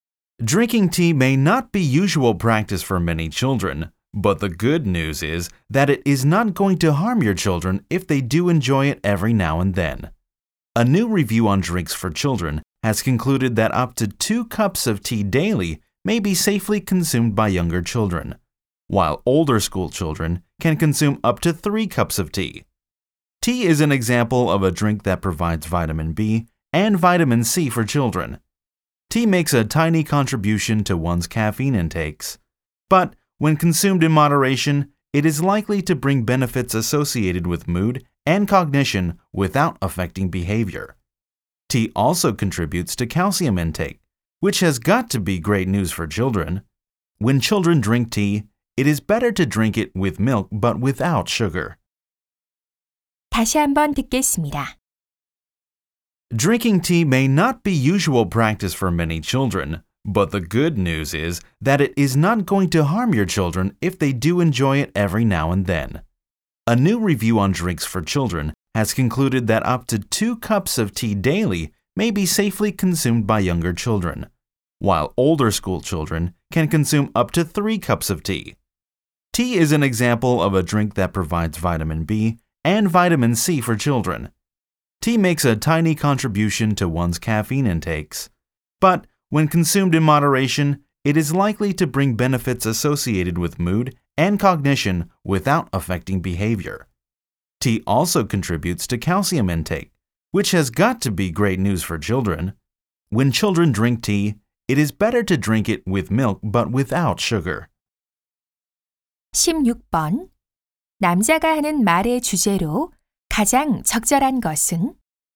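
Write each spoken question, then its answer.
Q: 남자가 하는 말의 주제로 가장 적절한 것은?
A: 적당량의 차가 어린이에게 주는 이점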